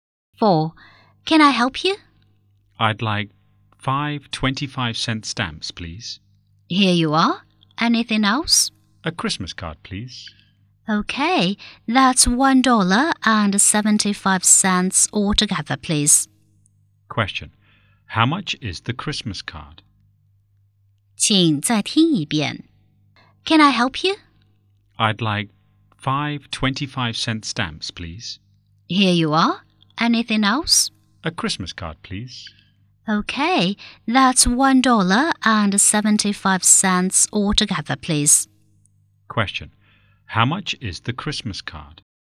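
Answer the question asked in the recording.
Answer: 50 cents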